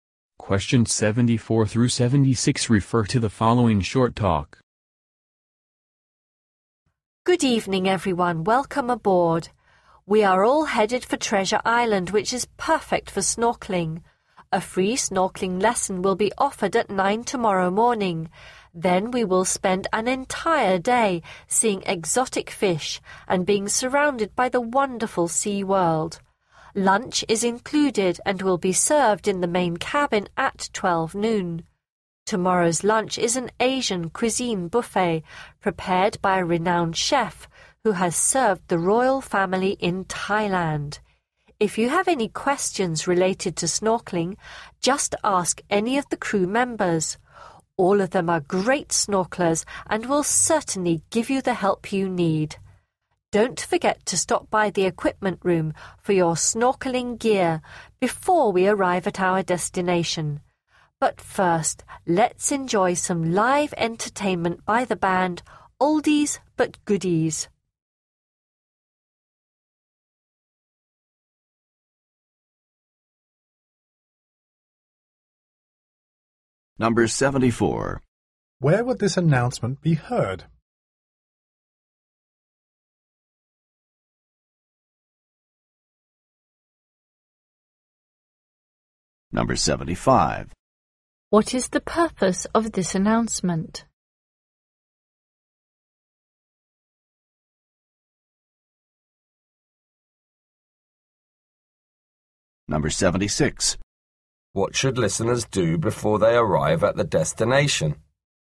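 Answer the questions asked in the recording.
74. On a boat
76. Pick up snorkeling gear from the equipment room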